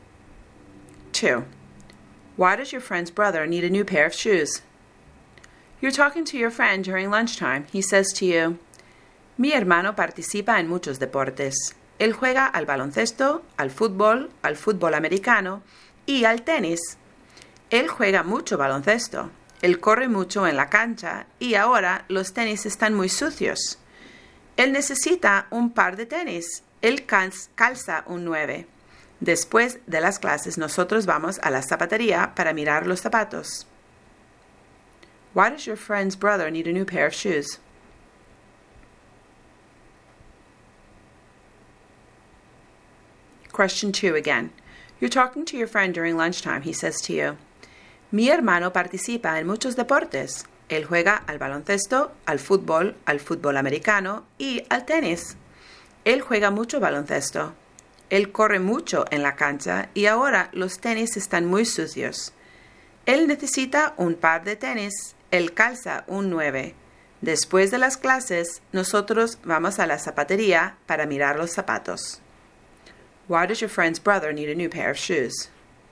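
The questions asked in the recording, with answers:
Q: Why does your friend's brother need a new pair of shoes?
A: His sneakers are very dirty from playing so much basketball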